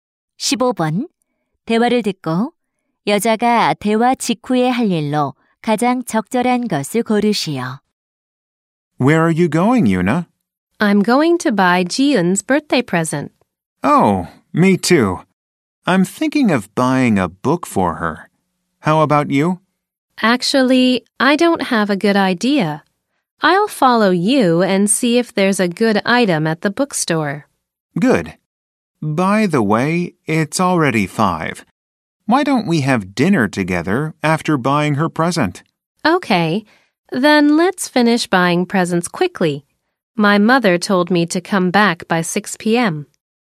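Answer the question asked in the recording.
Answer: 서점에 가서 생일 선물 사기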